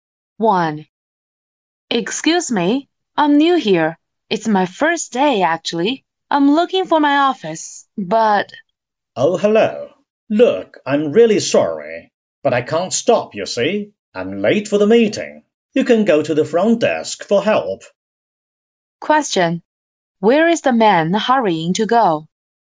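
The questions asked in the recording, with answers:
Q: Where is the man hurrying to go?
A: To a meeting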